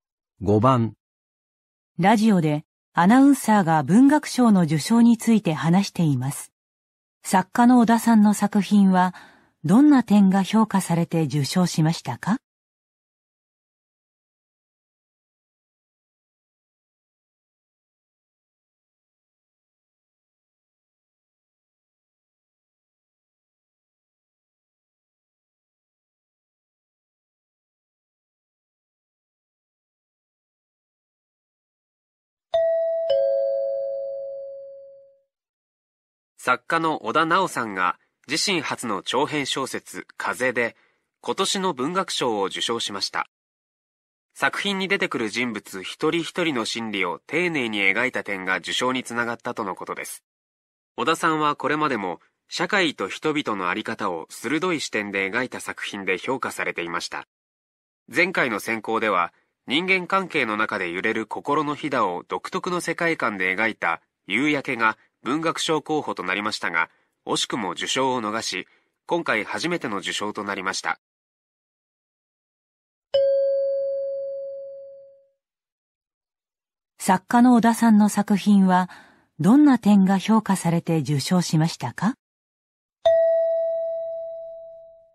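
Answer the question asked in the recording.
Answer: 登場人物一人一人の心理を丁寧に描いた点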